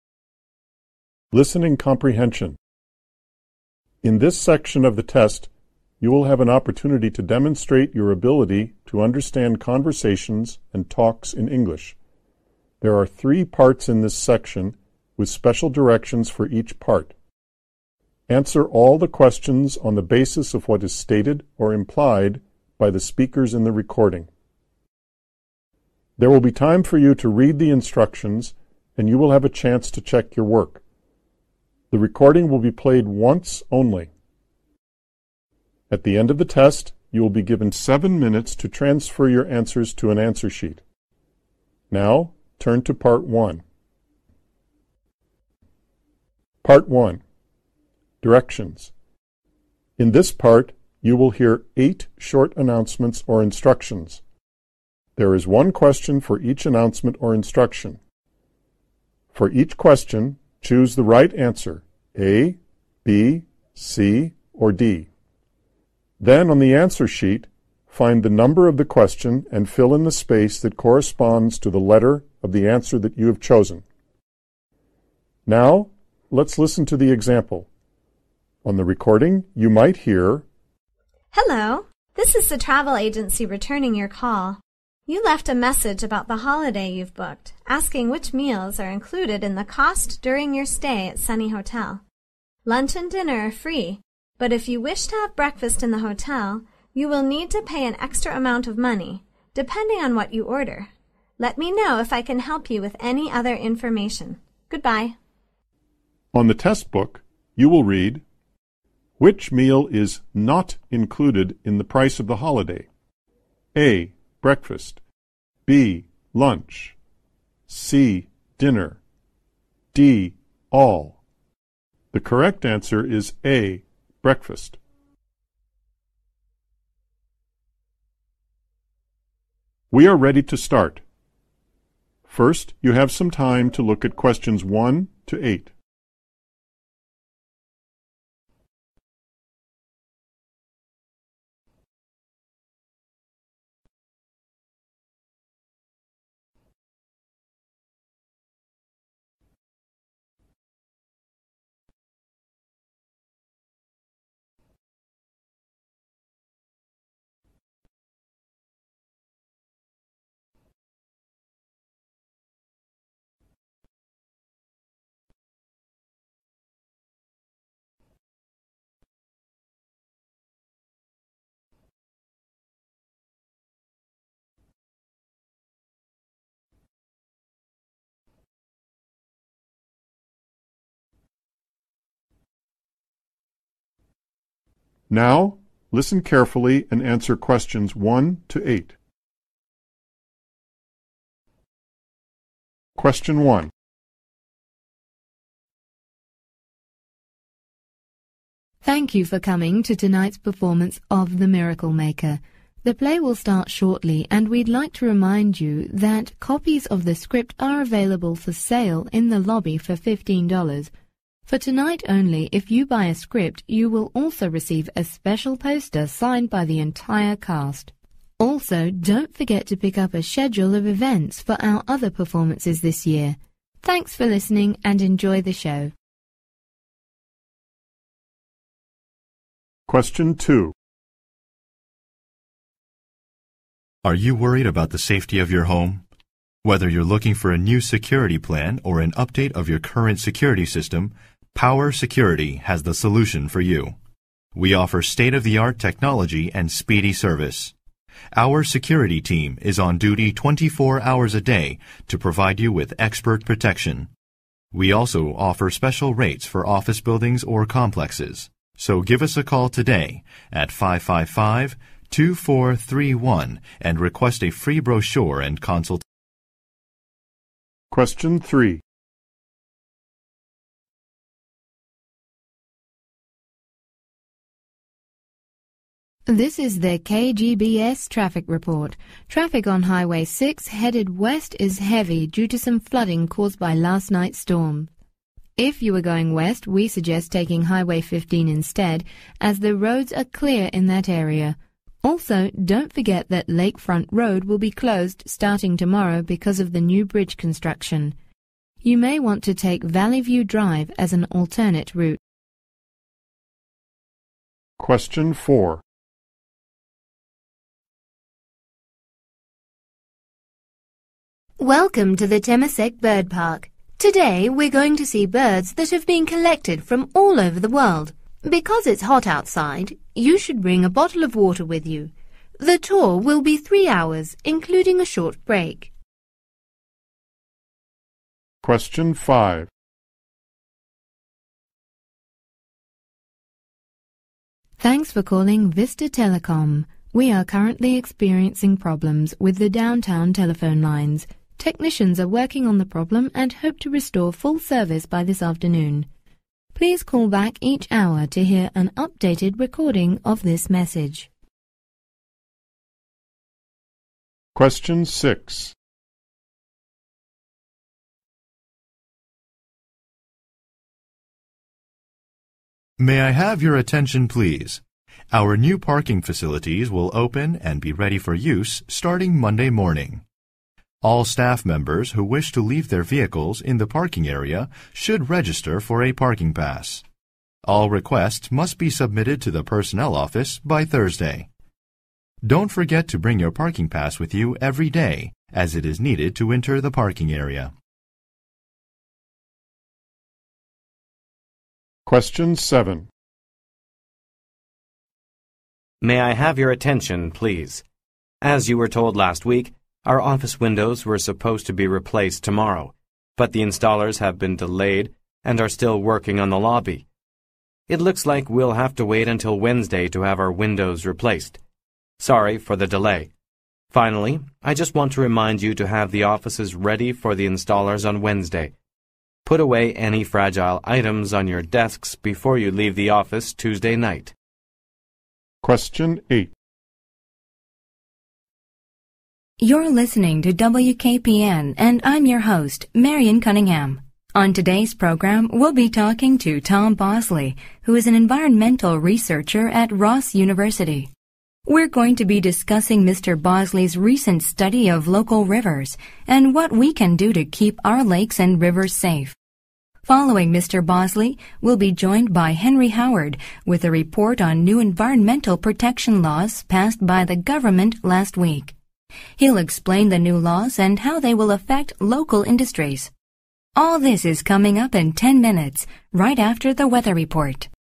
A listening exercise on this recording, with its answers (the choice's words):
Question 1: What does the advertisement offer for office buildings?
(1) Construction plans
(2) Free delivery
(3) Special prices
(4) Full installation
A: Construction plans

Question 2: According to the speaker, what will happen tomorrow?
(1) A street will open.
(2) Bridge construction will begin.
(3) Traffic will be heavy.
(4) Weather conditions will be foggy.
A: Bridge construction will begin.